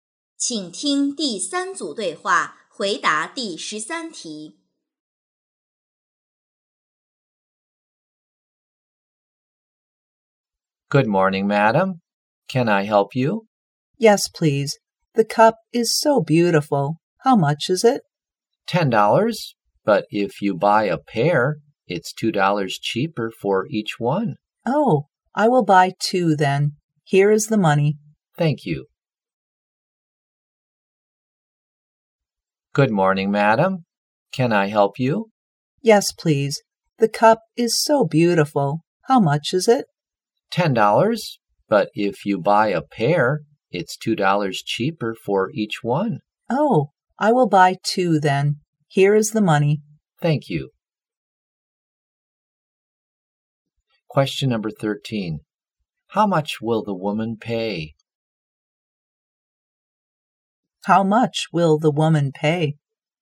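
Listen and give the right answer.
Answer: $16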